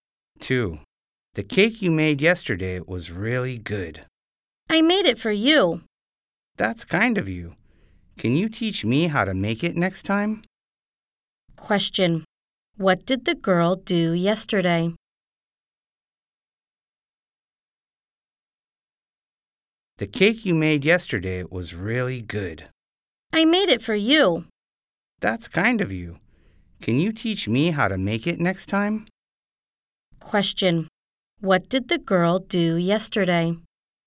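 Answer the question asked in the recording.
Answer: She made a cake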